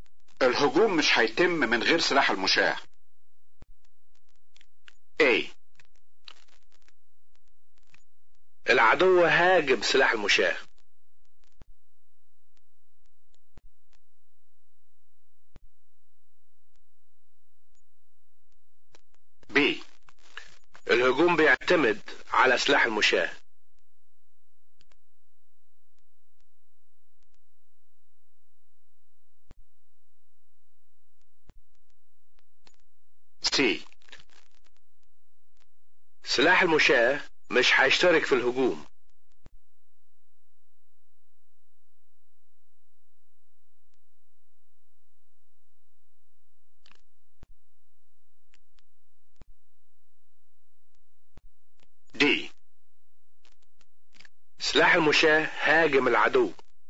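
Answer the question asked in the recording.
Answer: B: الهجوم بيعتمد على سلاح المشاة.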